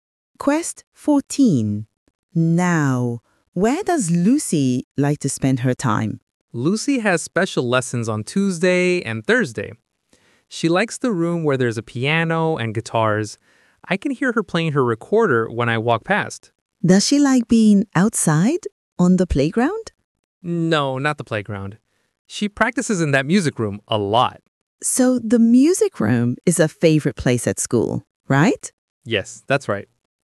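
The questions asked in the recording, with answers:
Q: Now, where does Lucy like to spend her time?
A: the music room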